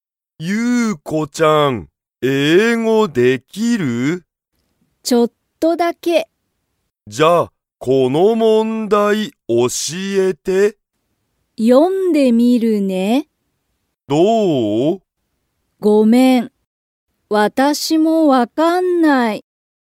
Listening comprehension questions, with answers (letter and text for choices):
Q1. ゆうこは、英語(えいご)が____。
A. よくできる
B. ちょっとだけできる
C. あまりできない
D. 全然(ぜんぜん)できない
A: B. ちょっとだけできる

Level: Level 1